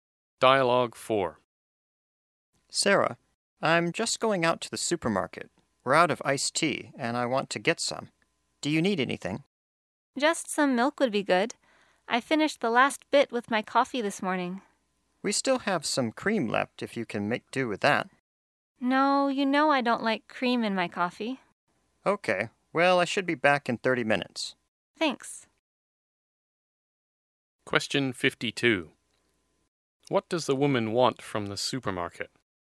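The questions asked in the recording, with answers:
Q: What does the woman want from the supermarket?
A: Milk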